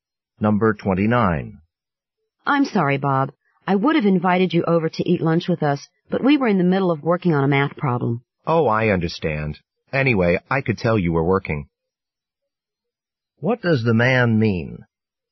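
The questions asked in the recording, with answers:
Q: What does the man mean?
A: He wasn't offended; he understood they were busy.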